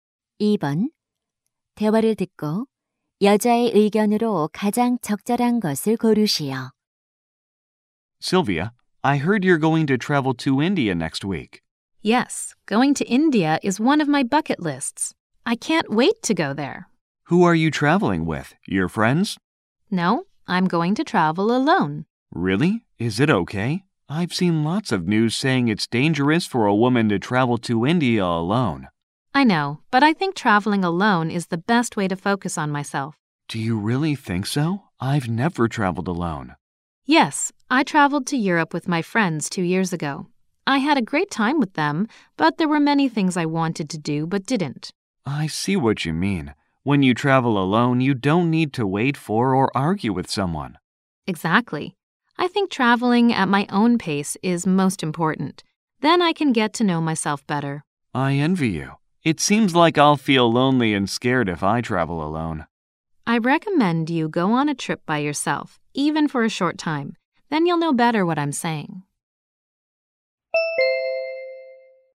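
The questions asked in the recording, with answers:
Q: 대화를 듣고 여자의 의견으로 가장 적절한 것을 고르시오.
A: 혼자 하는 여행은 자신에게 집중할 수 있는 최고의 방법이다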